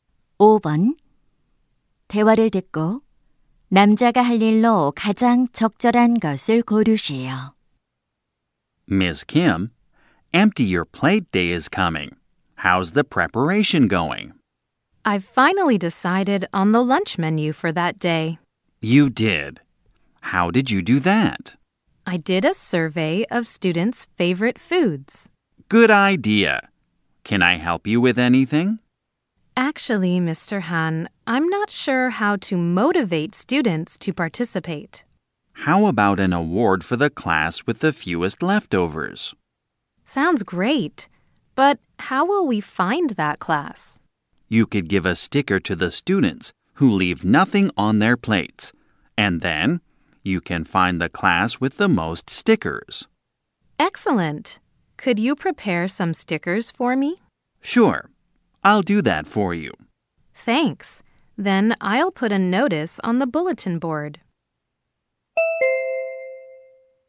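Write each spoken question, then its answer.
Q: 대화를 듣고 남자가 할 일로 가장 적절한 것을 고르시오.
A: 스티커 준비하기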